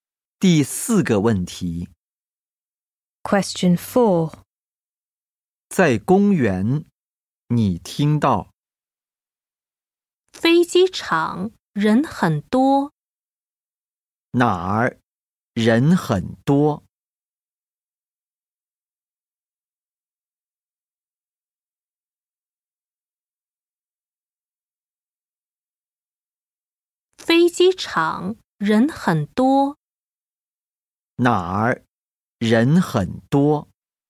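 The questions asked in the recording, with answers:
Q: 哪儿人很多?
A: 飞机场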